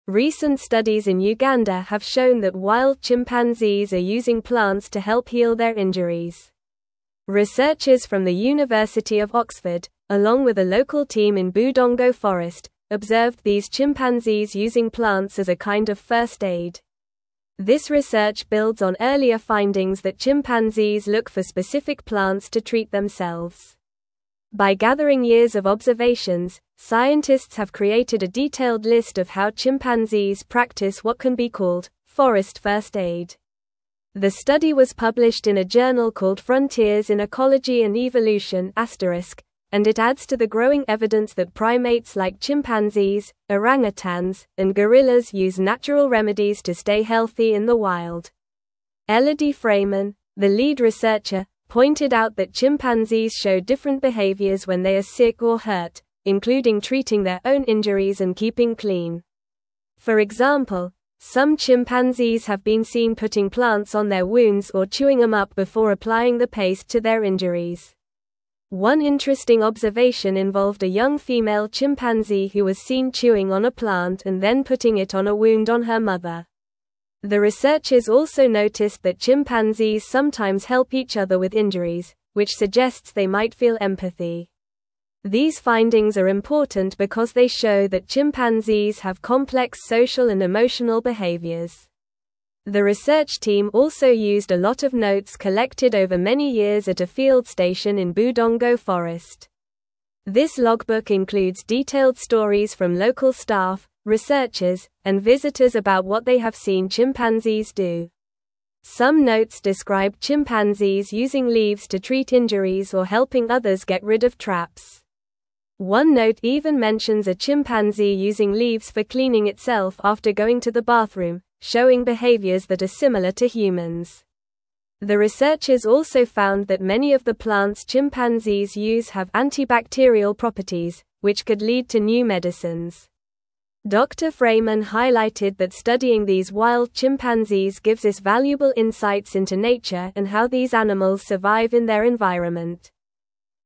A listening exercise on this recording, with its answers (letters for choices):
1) What did researchers in Uganda observe wild chimpanzees using to help heal their injuries?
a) Rocks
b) Water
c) Plants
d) Soil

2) Which university conducted the research on chimpanzees in Budongo Forest?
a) University of Oxford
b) Harvard University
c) Stanford University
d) University of Cambridge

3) What type of journal published the study on chimpanzees using plants for healing?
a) Nature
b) Science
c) Journal of Animal Behavior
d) Frontiers in Ecology and Evolution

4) What behavior did the researchers observe in chimpanzees when they were sick or hurt?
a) Treating their own injuries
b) Hiding from others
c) Sleeping more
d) Eating less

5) What did a young female chimpanzee do to help her mother?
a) Gave her food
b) Chewed on a plant and applied it to a wound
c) Groomed her fur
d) Played with her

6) What does the study suggest about chimpanzees' social behaviors?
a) They prefer to be alone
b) They do not interact with each other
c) They might feel empathy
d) They only care for themselves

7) What did the researchers find about the plants used by chimpanzees?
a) They are poisonous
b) Many have antibacterial properties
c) They are only for eating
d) They are used for building nests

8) What valuable insights does studying wild chimpanzees provide, according to Dr. Freymann?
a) Learning how to train them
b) Discovering new ways to keep them in captivity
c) Finding out how to make them more social with humans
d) Understanding how these animals survive in their environment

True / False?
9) Researchers from the University of Oxford worked alone in Budongo Forest to observe these behaviors.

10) Many plants used by chimpanzees do not have antibacterial properties, which could inspire new medicines for humans.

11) The researchers collected detailed notes over many years about chimpanzee behaviors in Budongo Forest.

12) Some chimpanzees have been observed treating their own injuries and helping others with theirs.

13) Chimpanzees have not been seen using specific plants as a form of first aid for themselves.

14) The study was published in a journal called *Frontiers in Ecology and Evolution*.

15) Elodie Freymann is not the lead researcher of the study about chimpanzees and their use of natural remedies.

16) Recent studies in Uganda found that wild chimpanzees use plants to help heal their injuries.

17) Recent studies in Uganda have shown that wild chimpanzees are using plants to help heal their (1)______.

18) Researchers from the University of Oxford, along with a local team in Budongo (2)______, observed these chimpanzees using plants as a kind of first aid.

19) By gathering years of (3)______, scientists have created a detailed list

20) The study was (4)______ in a journal called *Frontiers in Ecology and Evolution*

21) Elodie Freymann, the lead (5)______, pointed out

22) (6)______ treating their own injuries and keeping clean.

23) some chimpanzees have been seen putting (7)______ on their wounds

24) One interesting observation involved a (8)______ female chimpanzee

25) putting it on a wound on her (9)______.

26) which suggests they might feel (10)______.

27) This logbook includes detailed (11)______ from local staff, researchers, and (12)______ about what they have seen (13)______s do.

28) This logbook includes detailed (11)______ from local staff, researchers, and (12)______ about what they have seen (13)______s do.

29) This logbook includes detailed (11)______ from local staff, researchers, and (12)______ about what they have seen (13)______s do.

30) Some notes describe chimpanzees using leaves to treat injuries or (14)______ others get rid of traps.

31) One note even mentions a chimpanzee using leaves for (15)______ itself after going to the bathroom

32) studying these wild chimpanzees gives us (16)______ insights into nature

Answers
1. c
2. a
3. d
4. a
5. b
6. c
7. b
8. d
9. False
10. False
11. True
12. True
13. False
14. True
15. False
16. True
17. injuries
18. Forest
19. observations
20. published
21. researcher
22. including
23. plants
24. young
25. mother
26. empathy
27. stories
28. visitors
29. chimpanzee
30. helping
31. cleaning
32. valuable

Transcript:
Recent studies in Uganda have shown that wild chimpanzees are using plants to help heal their injuries. Researchers from the University of Oxford, along with a local team in Budongo Forest, observed these chimpanzees using plants as a kind of first aid. This research builds on earlier findings that chimpanzees look for specific plants to treat themselves. By gathering years of observations, scientists have created a detailed list of how chimpanzees practice what can be called "forest first aid."
The study was published in a journal called *Frontiers in Ecology and Evolution*, and it adds to the growing evidence that primates like chimpanzees, orangutans, and gorillas use natural remedies to stay healthy in the wild. Elodie Freymann, the lead researcher, pointed out that chimpanzees show different behaviors when they are sick or hurt, including treating their own injuries and keeping clean. For example, some chimpanzees have been seen putting plants on their wounds or chewing them up before applying the paste to their injuries.
One interesting observation involved a young female chimpanzee who was seen chewing on a plant and then putting it on a wound on her mother. The researchers also noticed that chimpanzees sometimes help each other with injuries, which suggests they might feel empathy. These findings are important because they show that chimpanzees have complex social and emotional behaviors.
The research team also used a lot of notes collected over many years at a field station in Budongo Forest. This logbook includes detailed stories from local staff, researchers, and visitors about what they have seen chimpanzees do. Some notes describe chimpanzees using leaves to treat injuries or helping others get rid of traps. One note even mentions a chimpanzee using leaves for cleaning itself after going to the bathroom, showing behaviors that are similar to humans. The researchers also found that many of the plants chimpanzees use have antibacterial properties, which could lead to new medicines. Dr. Freymann highlighted that studying these wild chimpanzees gives us valuable insights into nature and how these animals survive in their environment.

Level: Level 3